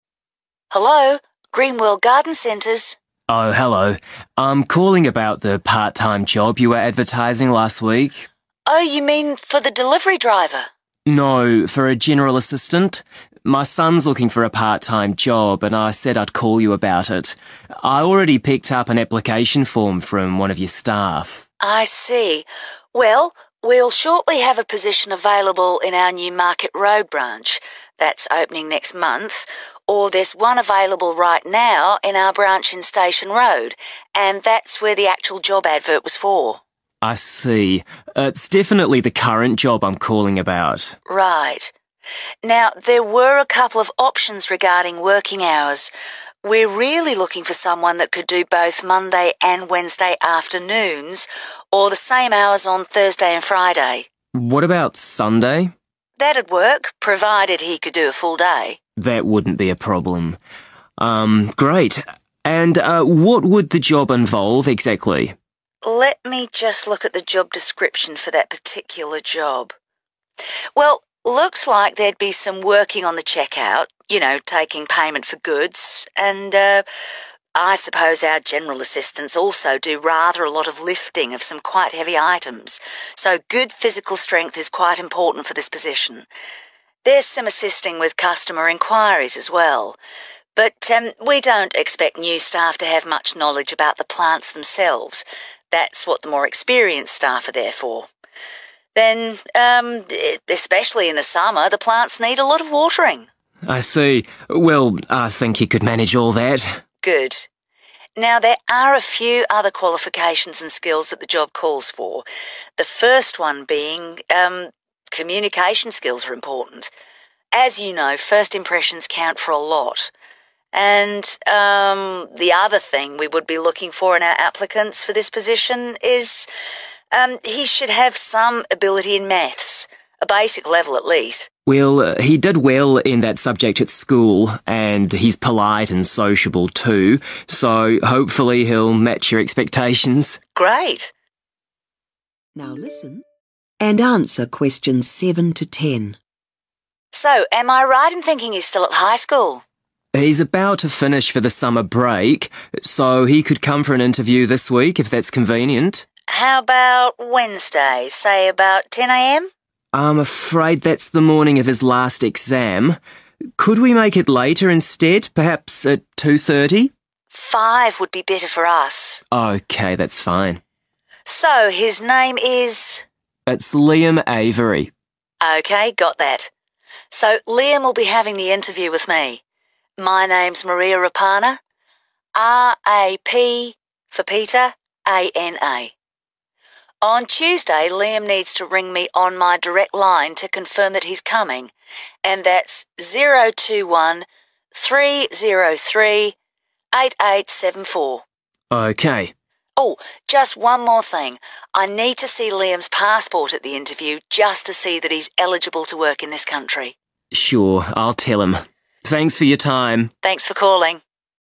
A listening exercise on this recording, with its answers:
Complete the form below. Write ONE WORD AND/OR A NUMBER for each answer.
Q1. Job available now in the 1................... Branch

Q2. Days/hours of work 2................... (all day)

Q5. good 5................... skills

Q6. basic ability in 6...................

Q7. Interview arranged for 7................... on Wednesday this week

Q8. Name of interviewer: Maria 8...................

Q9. Contact number: 9...................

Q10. Should take his 10................... to the interview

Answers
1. Station
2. Sunday
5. communication
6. math/ maths
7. 5 p.m/ 5/ 5 pm
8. Rapana
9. 0213038874
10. passport